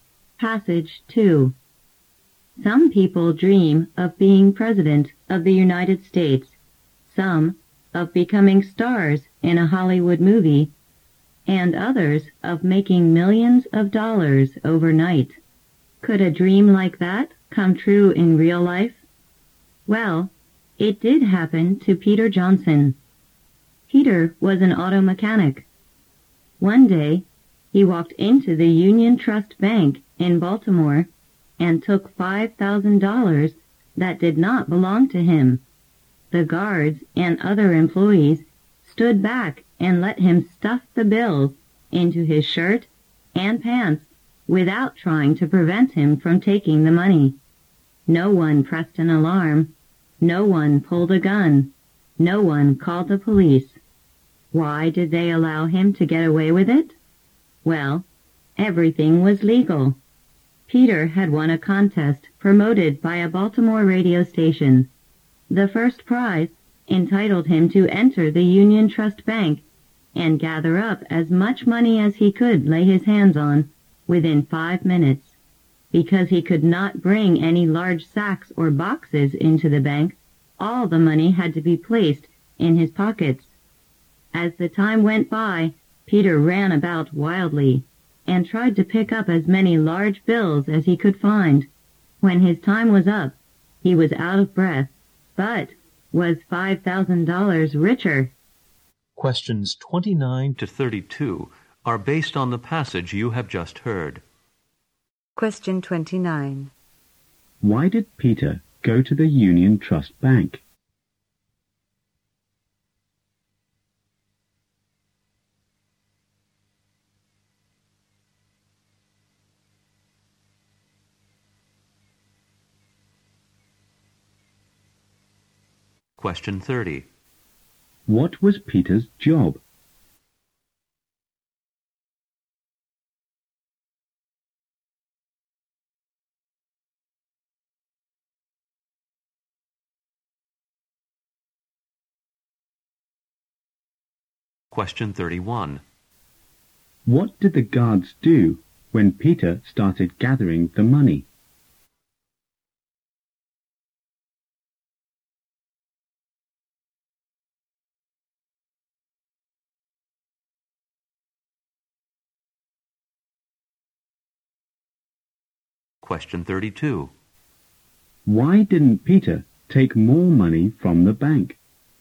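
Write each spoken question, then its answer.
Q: Why did Peter go to the Union Trust Bank?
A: He had won a radio contest

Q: What was Peter's job?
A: Auto mechanic

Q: What did the guards do when Peter started gathering the money?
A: They stood back and did nothing

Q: Why didn't Peter take more money from the bank?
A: He had only 5 minutes and could only use his pockets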